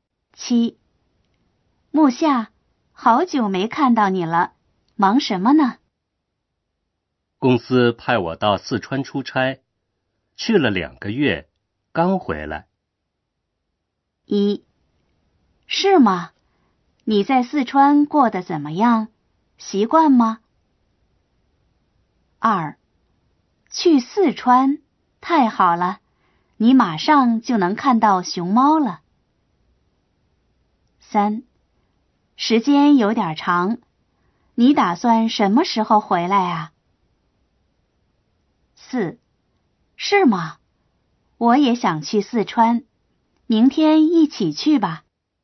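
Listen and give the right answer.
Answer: 1: 是吗?你在四川过得怎么样?习惯吗?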